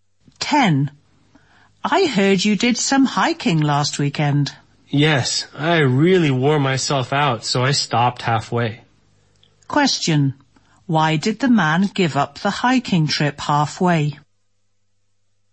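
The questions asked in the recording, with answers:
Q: Why did the man give up the hiking trip halfway?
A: He was too tired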